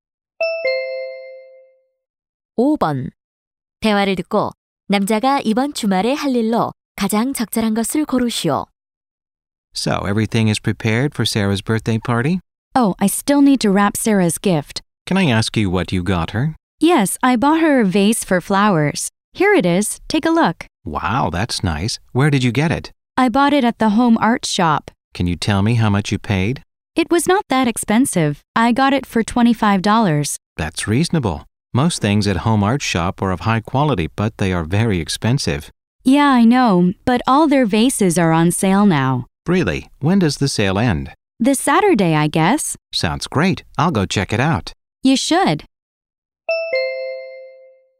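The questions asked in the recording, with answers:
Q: 대화를 듣고 남자가 이번 주말에 할 일로 가장 적절한 것을 고르시오.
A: Home Art Shop 세일에 가 보기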